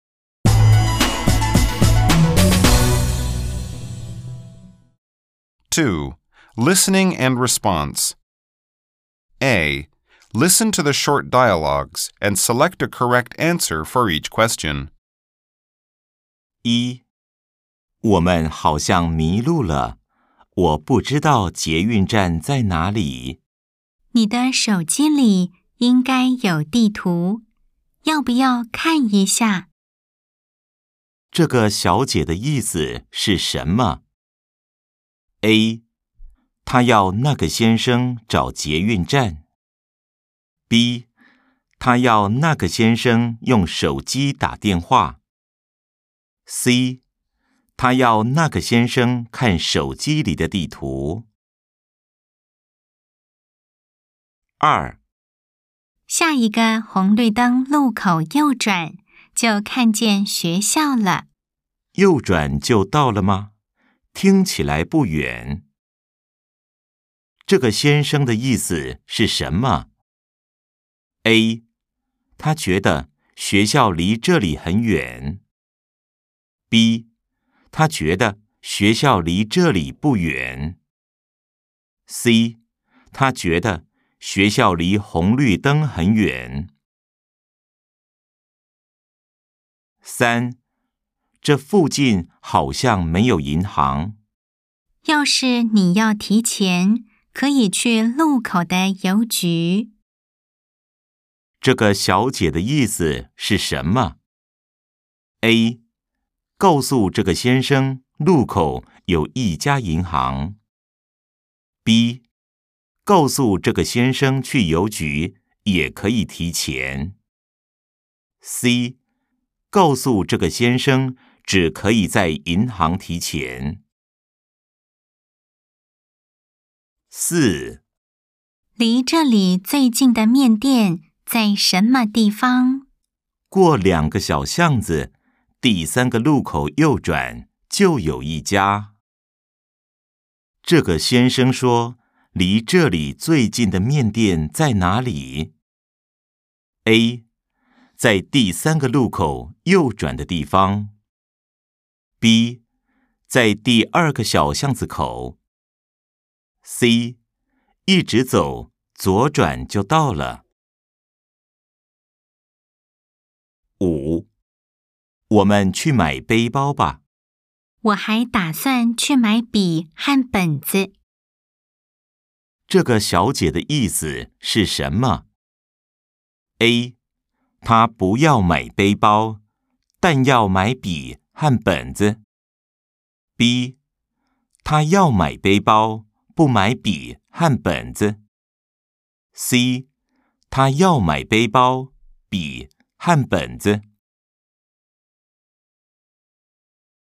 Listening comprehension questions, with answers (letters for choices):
A. Nghe những gì được nói về cô Trần và chọn câu trả lời chính xác những câu hỏi dưới đây.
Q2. 這個先生的意思是什麼?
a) 他覺得學校離這裡很遠。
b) 他覺得學校離這裡不遠。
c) 他覺得學校離紅綠燈很遠。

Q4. 這個先生說離這裡最近的麵店在哪裡?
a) 在第三個路口右轉的地方。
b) 在第二個小巷子口。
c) 一直走,左轉就到了。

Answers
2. b
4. a

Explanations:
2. Người nữ nói: "rẽ phải là thấy trường học", người nam trả lời: "Nghe có vẻ không xa", do đó đáp án đúng là b – Anh ấy nghĩ trường không xa.
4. Nam nói: "Qua 2 con hẻm nhỏ, rẽ phải ở ngã ba thứ ba là thấy", nên đáp án chính xác là a – rẽ phải ở ngã ba thứ ba.